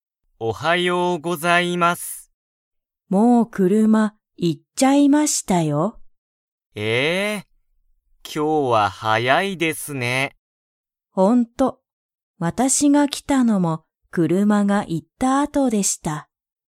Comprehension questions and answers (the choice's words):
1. もう____は行(い)ってしまった。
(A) 音楽(おんがく)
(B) 店(みせ)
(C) 家族(かぞく)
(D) 車(くるま)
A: 車(くるま)